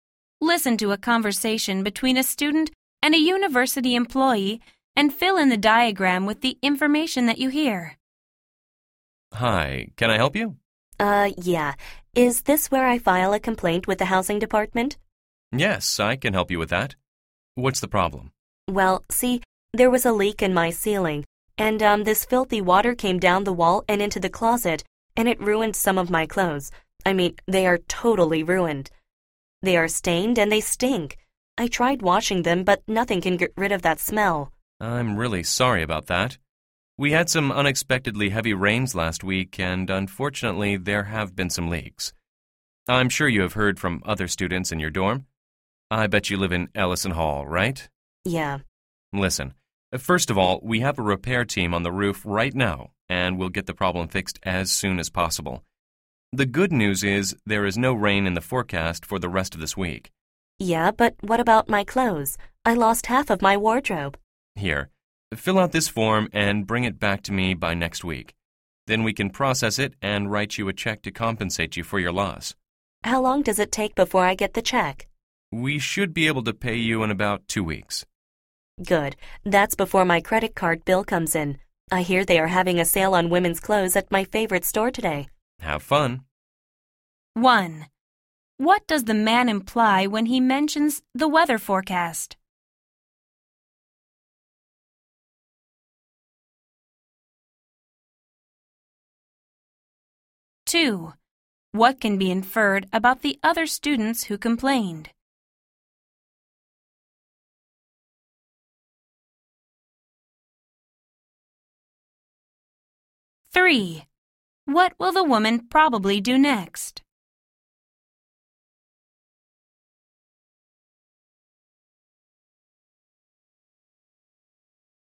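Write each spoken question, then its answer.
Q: What does the man imply when he mentions the weather forecast?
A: The leak won't cause more damage before the roof is repaired.

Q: What can be inferred about the other students who complained?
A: They also live in Ellison Hall.

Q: What will the woman probably do next?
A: Go shopping at the clothing sale at her favorite store.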